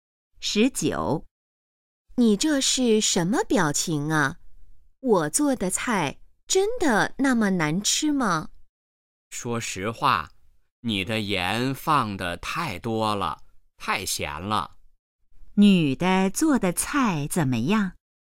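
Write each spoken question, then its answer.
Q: 女的做的菜怎么样?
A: 太咸了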